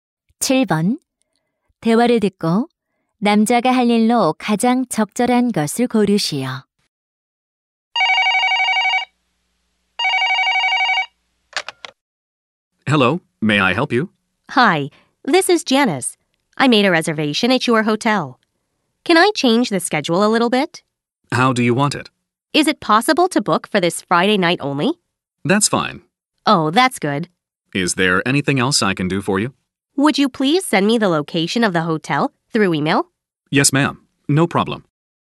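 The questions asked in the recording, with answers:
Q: 대화를 듣고 남자가 할 일로 가장 적절한 것을 고르시오.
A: 호텔 위치를 이메일로 보내기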